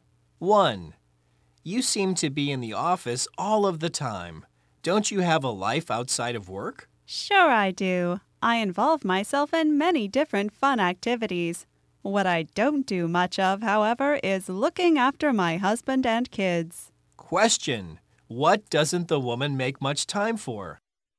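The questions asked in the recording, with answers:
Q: what doesn't the woman make much time for?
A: Looking after her husband and kids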